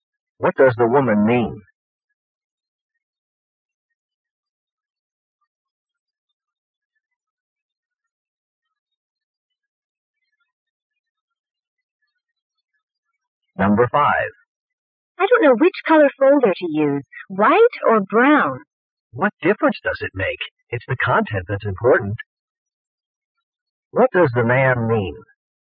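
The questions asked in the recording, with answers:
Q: What does the man mean?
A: The folder color doesn't matter; the content is what's important.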